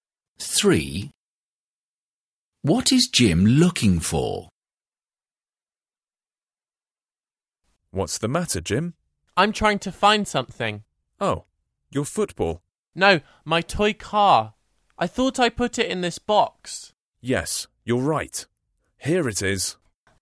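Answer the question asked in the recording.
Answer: His toy car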